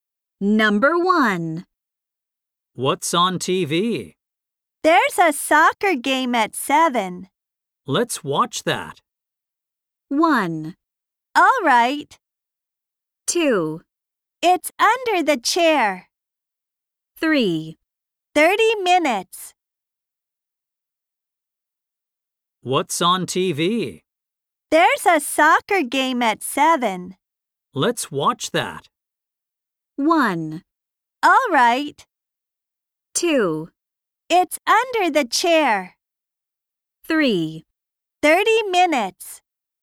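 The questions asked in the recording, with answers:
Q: Let's watch that.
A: 1: All right.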